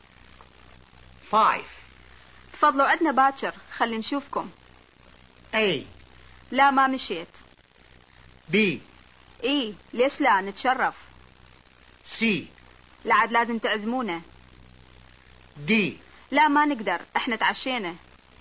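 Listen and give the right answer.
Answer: B: إي ليش لا نتشرف.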